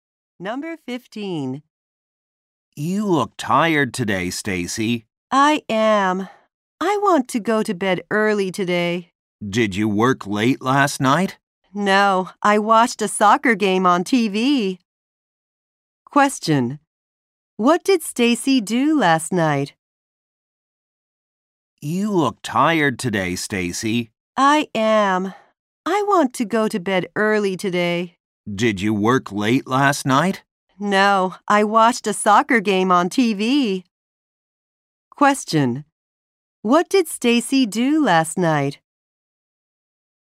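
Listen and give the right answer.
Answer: She watched a soccer game on TV.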